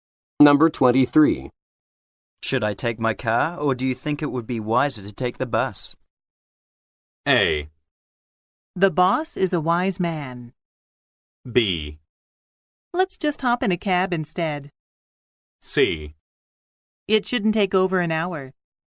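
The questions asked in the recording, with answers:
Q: Should I take my car, or do you think it would be wiser to take the bus?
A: B: Let's just hop in a cab instead.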